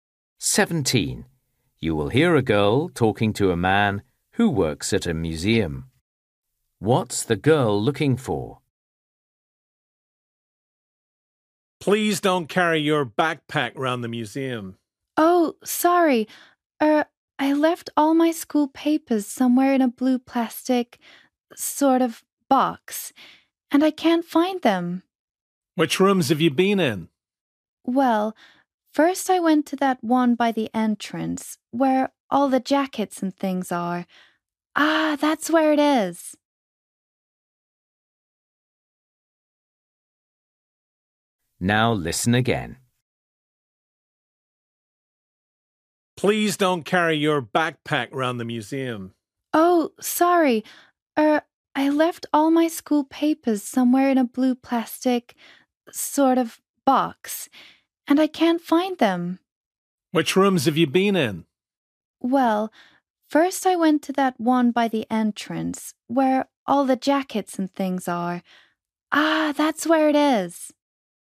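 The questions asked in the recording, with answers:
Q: What's the girl looking for?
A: Her school papers in a blue plastic box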